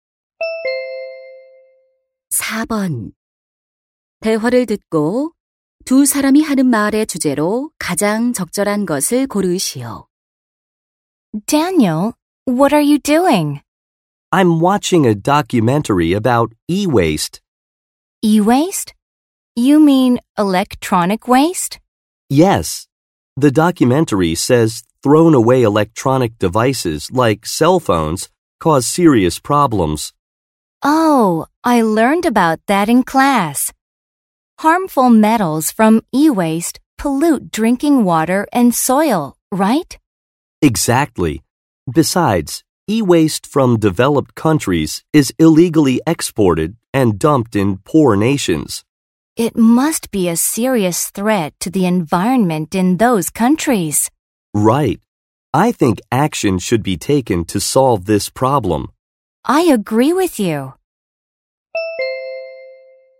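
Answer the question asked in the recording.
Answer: 전자 폐기물로 인한 문제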